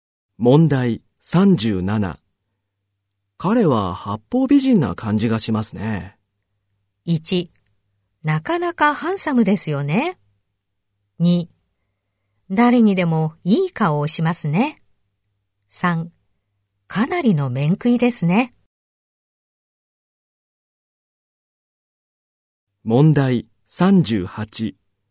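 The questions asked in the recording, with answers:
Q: 彼は八方美人な感じがしますね。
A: 2: 誰にでもいい顔をしますね。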